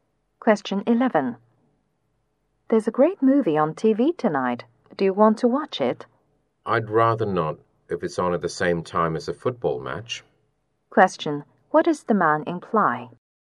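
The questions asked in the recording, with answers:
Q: What does the man imply?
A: He would rather watch the football match than the movie.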